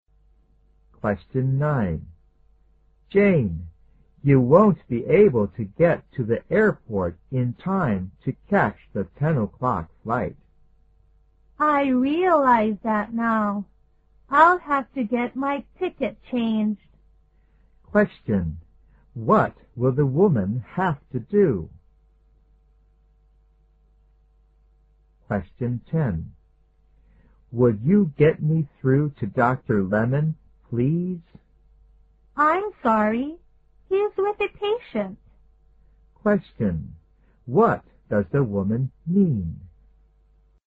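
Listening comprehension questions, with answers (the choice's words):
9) Q: What will the woman have to do?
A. Switch to a different flight.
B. Go to the airport immediately.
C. Ask the man to change the ticket for her.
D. Buy a ticket for the ten o'clock flight.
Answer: Switch to a different flight.

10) Q: What does the woman mean?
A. Dr. Lemon has lost his patience.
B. Dr. Lemon is waiting for a patient.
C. Dr. Lemon is busy at the moment.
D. Dr. Lemon has gone out to visit a patient.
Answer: Dr. Lemon is busy at the moment.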